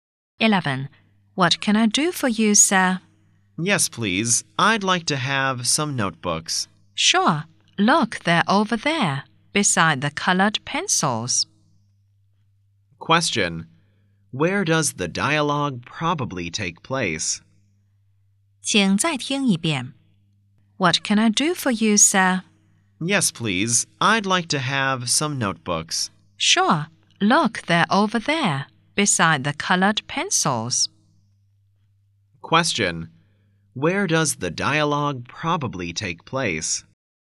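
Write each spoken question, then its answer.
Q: Where does the dialogue probably take place?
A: In a stationery shop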